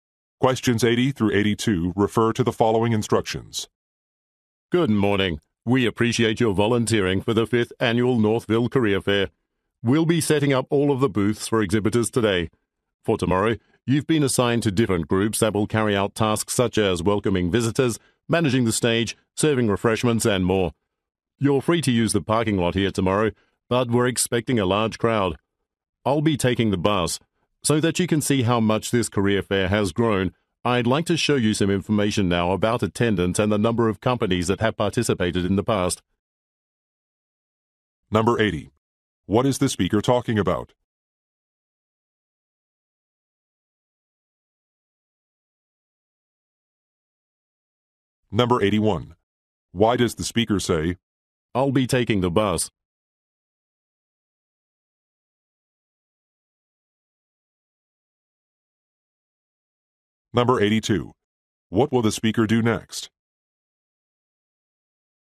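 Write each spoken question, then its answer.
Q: What is the speaker talking about?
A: Volunteering at a career fair

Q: Why does the speaker say, I'll be taking the bus?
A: To suggest parking may be difficult, so listeners might take the bus

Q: What will the speaker do next?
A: Show information about past attendance and participating companies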